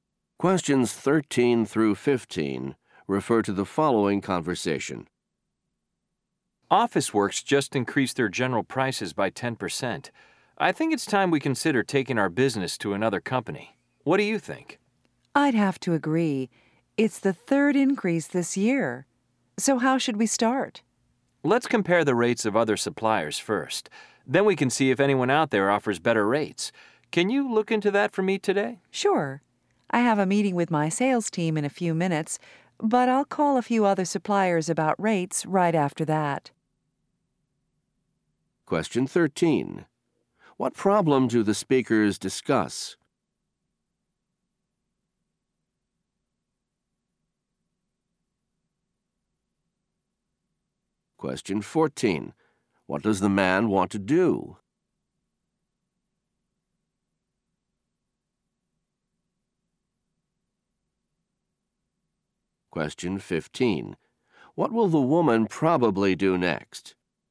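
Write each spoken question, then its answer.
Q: What problem do the speakers discuss?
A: A supplier raised its prices by 10%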